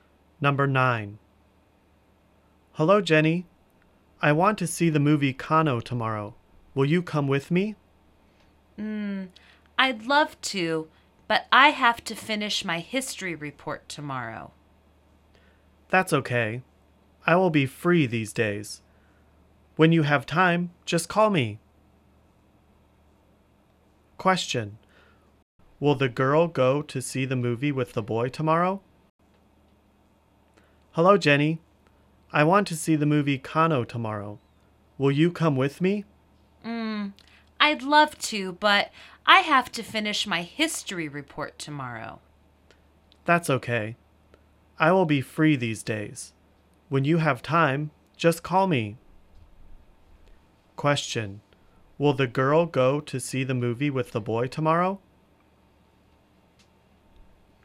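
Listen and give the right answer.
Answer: No, she has to finish her history report.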